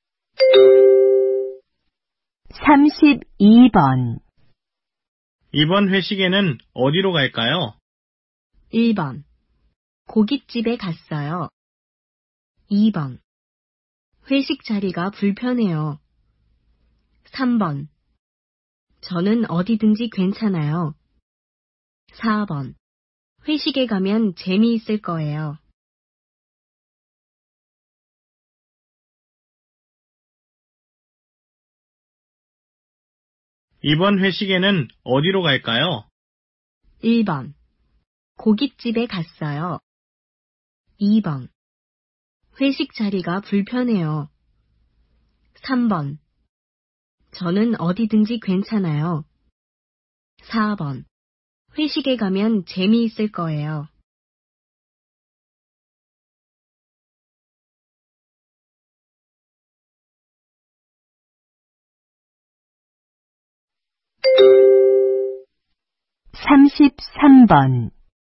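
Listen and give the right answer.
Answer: 3: 저는 어디든지 괜찮아요.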